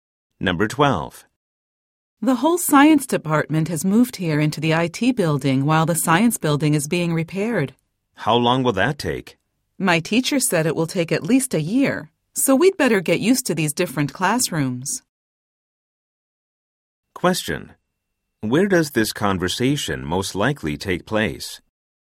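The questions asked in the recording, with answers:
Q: Where does this conversation most likely take place?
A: In the IT building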